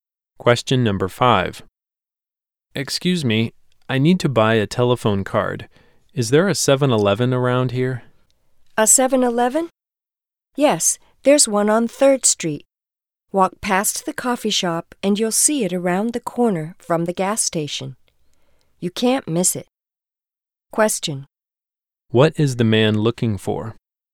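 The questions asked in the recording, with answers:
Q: What is the man looking for?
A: A 7-Eleven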